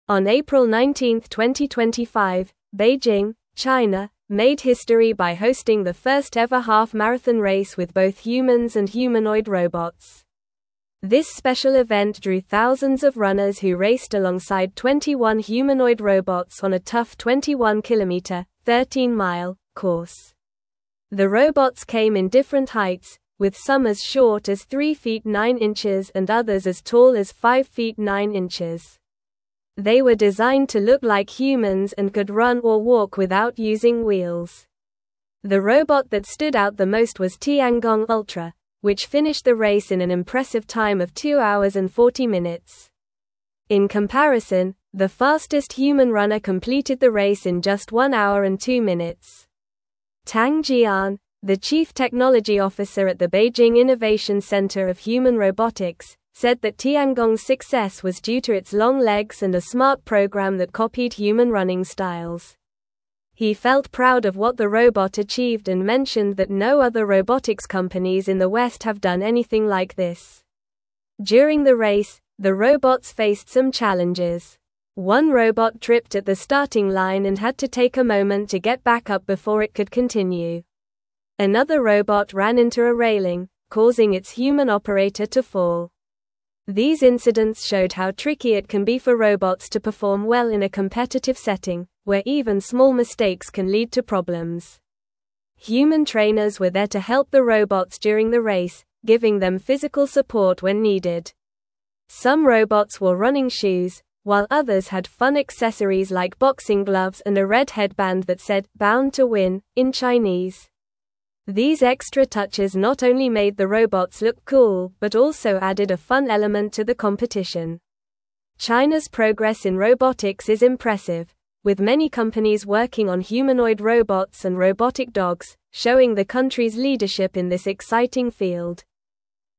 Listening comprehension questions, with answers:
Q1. On April 19, 2025, Beijing, China, made history by hosting the first-ever half-marathon race with both (1)______ and humanoid robots.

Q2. This (2)______ event drew thousands of runners who raced alongside 21 humanoid robots on a (3)______ 21-kilometer (13-mile) course.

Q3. This (2)______ event drew thousands of runners who raced alongside 21 humanoid robots on a (3)______ 21-kilometer (13-mile) course.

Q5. The robot that stood out the most was Tiangong (5)______, which finished the race in an impressive time of two hours and 40 minutes.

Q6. In comparison, the fastest (6)______ runner completed the race in just one hour and two minutes.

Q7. Tang Jian, the chief technology officer at the Beijing Innovation (7)______ of Human Robotics,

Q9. During the race, the robots faced some (9)______.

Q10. One robot tripped at the starting line and had to take a moment to get back up before it could (10)______.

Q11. Another robot ran into a railing, causing its human (11)______ to fall.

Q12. These incidents showed how (12)______ it can be for robots to perform well in a competitive setting, where even small mistakes can lead to problems.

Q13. Human trainers were there to help the robots during the race, giving them physical support when (13)______.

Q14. Some (14)______ wore running (15)______, while others had fun accessories like boxing gloves and a red headband that said "Bound to Win" in Chinese.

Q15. Some (14)______ wore running (15)______, while others had fun accessories like boxing gloves and a red headband that said "Bound to Win" in Chinese.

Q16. China's (16)______ in robotics is impressive, with many companies working on humanoid robots and robotic dogs, showing the country's leadership in this exciting field.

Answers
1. humans
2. special
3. tough
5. Ultra
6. human
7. Centre
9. challenges
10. continue
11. operator
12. tricky
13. needed
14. robots
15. shoes
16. progress

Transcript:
On April 19, 2025, Beijing, China, made history by hosting the first-ever half-marathon race with both humans and humanoid robots. This special event drew thousands of runners who raced alongside 21 humanoid robots on a tough 21-kilometer (13-mile) course. The robots came in different heights, with some as short as 3 feet 9 inches and others as tall as 5 feet 9 inches. They were designed to look like humans and could run or walk without using wheels.
The robot that stood out the most was Tiangong Ultra, which finished the race in an impressive time of two hours and 40 minutes. In comparison, the fastest human runner completed the race in just one hour and two minutes. Tang Jian, the chief technology officer at the Beijing Innovation Centre of Human Robotics, said that Tiangong's success was due to its long legs and a smart program that copied human running styles. He felt proud of what the robot achieved and mentioned that no other robotics companies in the West have done anything like this.
During the race, the robots faced some challenges. One robot tripped at the starting line and had to take a moment to get back up before it could continue. Another robot ran into a railing, causing its human operator to fall. These incidents showed how tricky it can be for robots to perform well in a competitive setting, where even small mistakes can lead to problems.
Human trainers were there to help the robots during the race, giving them physical support when needed. Some robots wore running shoes, while others had fun accessories like boxing gloves and a red headband that said "Bound to Win" in Chinese. These extra touches not only made the robots look cool but also added a fun element to the competition. China's progress in robotics is impressive, with many companies working on humanoid robots and robotic dogs, showing the country's leadership in this exciting field.

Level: Level 3